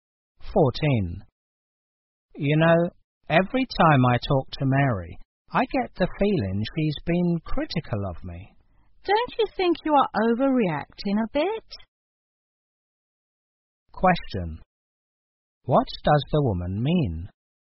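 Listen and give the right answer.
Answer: The man is overreacting; Mary probably isn't critical of him.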